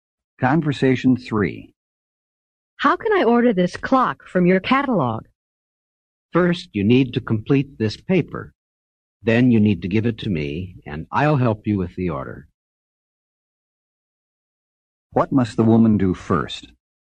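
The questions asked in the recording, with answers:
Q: What must the woman do first?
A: Complete a paper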